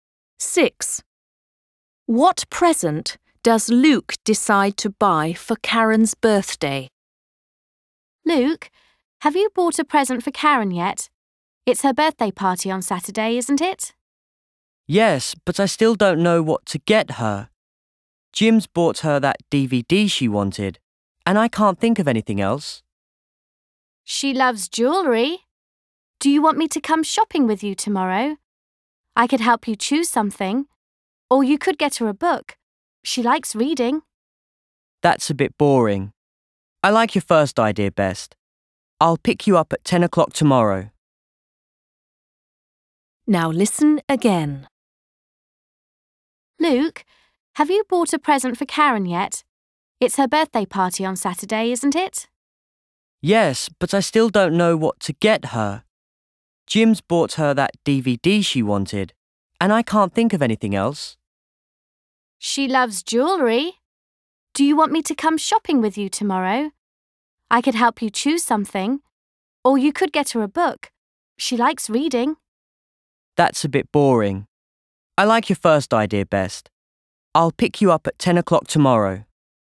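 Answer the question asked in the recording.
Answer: Jewellery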